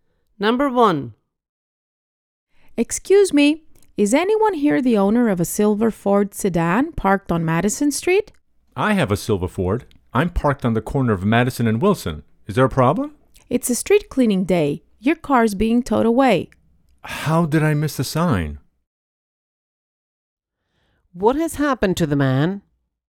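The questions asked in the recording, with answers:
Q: What has happened to the man?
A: His car is being towed away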